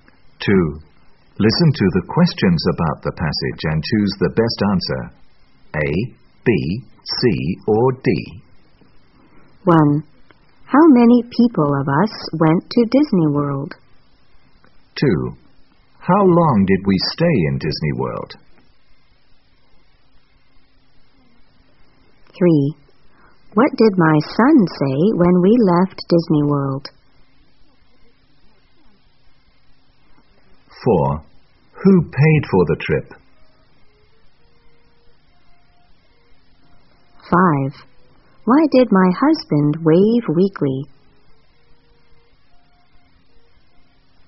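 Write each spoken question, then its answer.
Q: How many people of us went to Disney World?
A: Four

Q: What did my son say when we left Disney World?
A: Goodbye, Mickey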